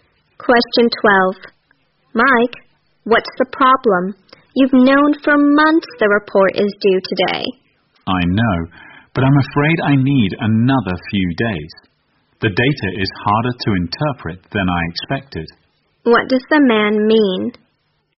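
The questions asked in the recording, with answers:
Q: What does the man mean?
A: He needs a few more days to finish the report.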